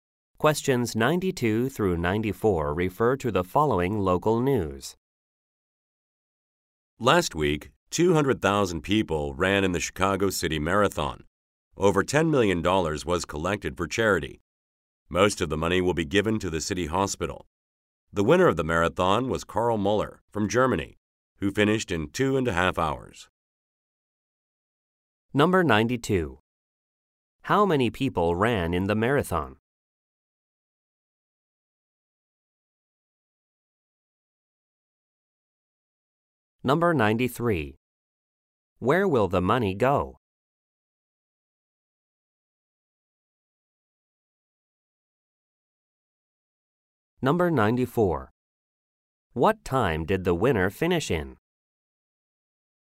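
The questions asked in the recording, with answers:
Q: How many people ran in the marathon?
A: 200,000

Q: Where will the money go?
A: Mostly to the city hospital

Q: What time did the winner finish in?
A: 2.5 hours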